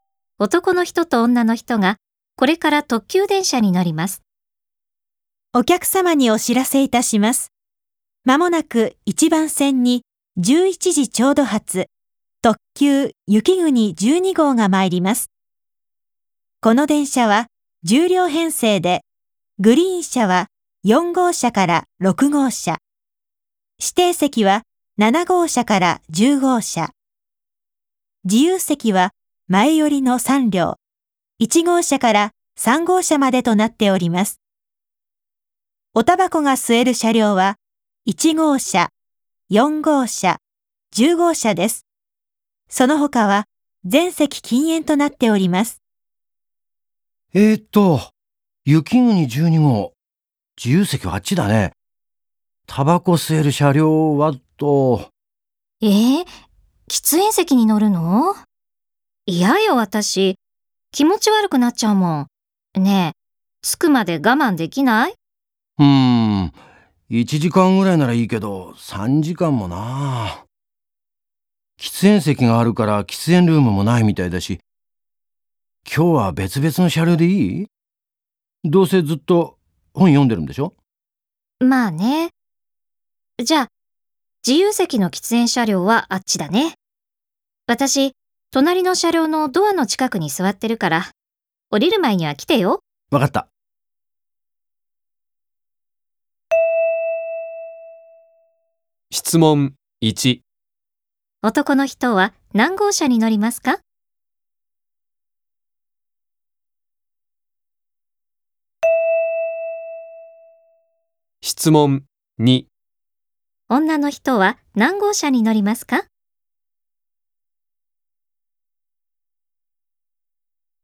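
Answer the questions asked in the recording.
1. 1号車
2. 2号車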